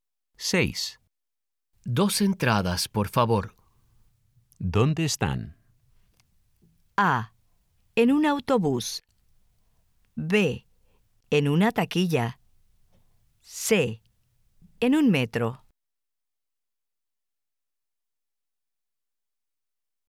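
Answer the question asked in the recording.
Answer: B: En una taquilla.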